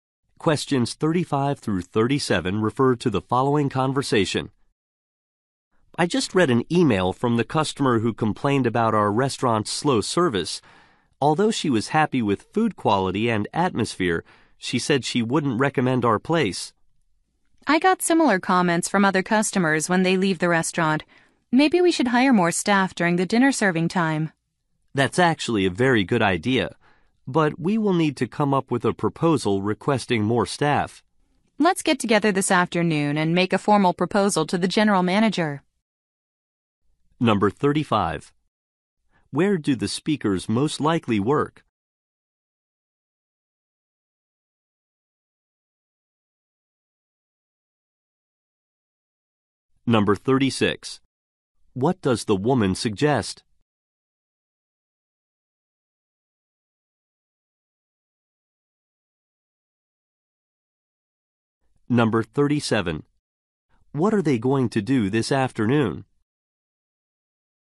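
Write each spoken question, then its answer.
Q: Where do the speakers most likely work?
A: At a restaurant

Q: What does the woman suggest?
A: Hiring more staff at dinner time

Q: What are they going to do this afternoon?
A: Write a formal proposal to the general manager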